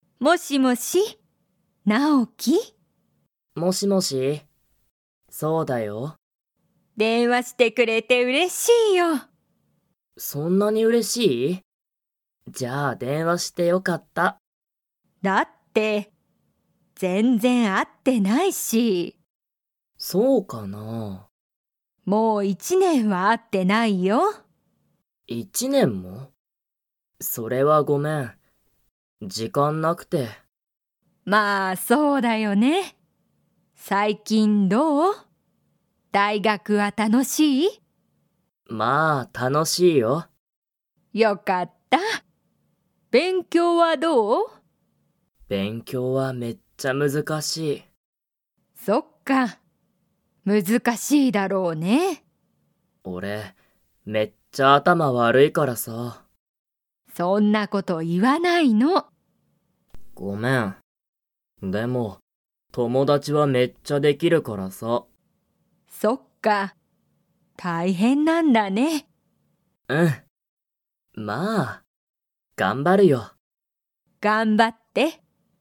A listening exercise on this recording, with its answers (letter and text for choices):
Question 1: ナオキは、お母(かあ)さんとよく会(あ)いますか?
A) はい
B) いいえ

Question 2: 勉強(べんきょう)は、____。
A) すごい楽(たの)しい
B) あまり楽(たの)しくない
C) めっちゃ大変(たいへん)だ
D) 全然大変(ぜんぜんたいへん)じゃない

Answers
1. B) いいえ
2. C) めっちゃ大変(たいへん)だ

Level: Level 2